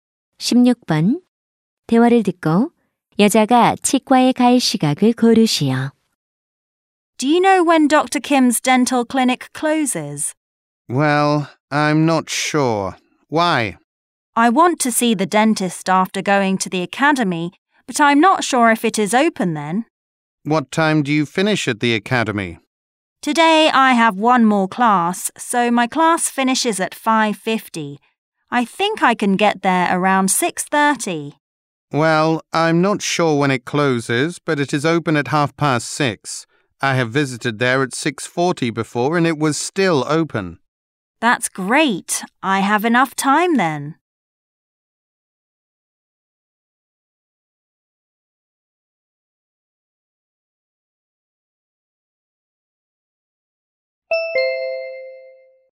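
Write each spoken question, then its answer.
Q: 대화를 듣고 여자가 치과에 갈 시각을 고르시오.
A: 6시 30분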